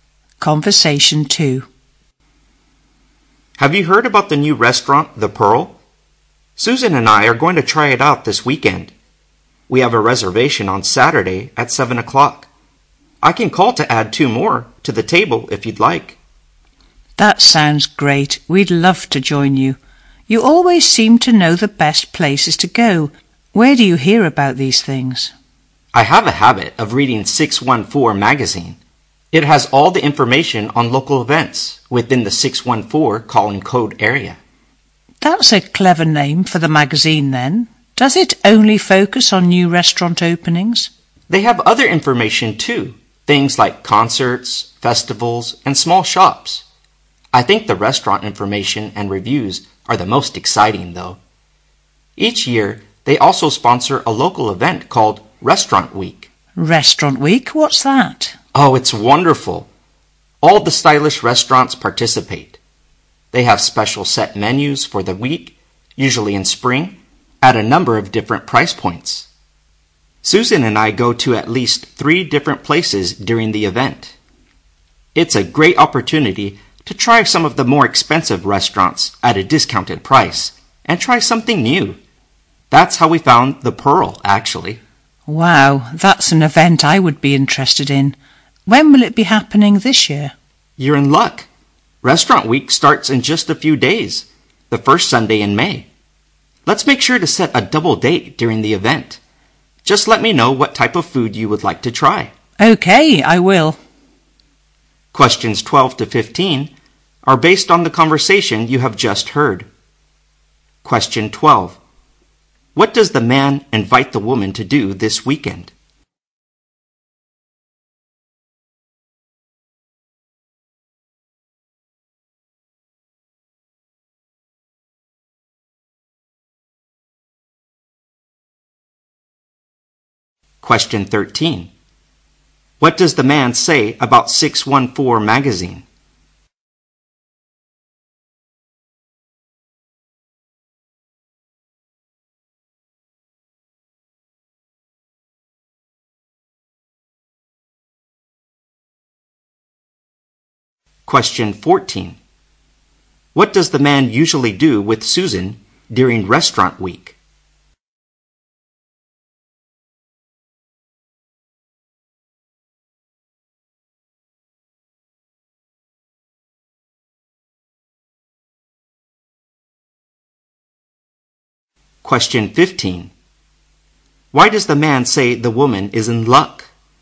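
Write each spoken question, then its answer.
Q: What does the man invite the woman to do this weekend?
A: Join him and Susan for dinner at the new restaurant, The Pearl.

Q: What does the man say about 614 magazine?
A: It has information on local events in the 614 area.

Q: What does the man usually do with Susan during Restaurant Week?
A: They go to at least three different restaurants.

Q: Why does the man say the woman is in luck?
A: Restaurant Week starts in just a few days.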